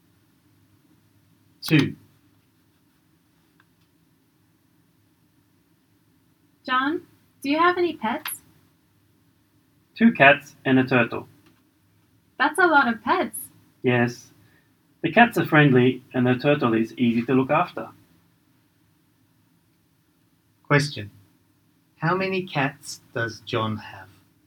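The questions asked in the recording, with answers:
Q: How many cats does John have?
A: Two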